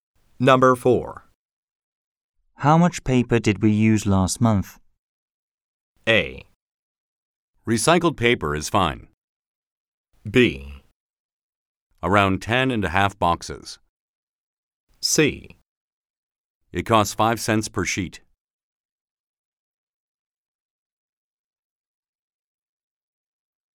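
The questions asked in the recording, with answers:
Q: How much paper did we use last month?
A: B: Around 10.5 boxes.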